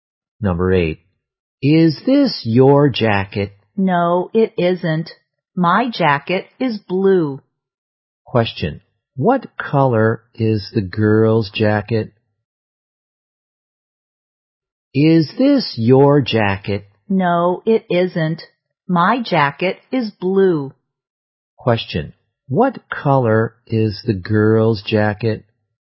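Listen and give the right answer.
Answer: Blue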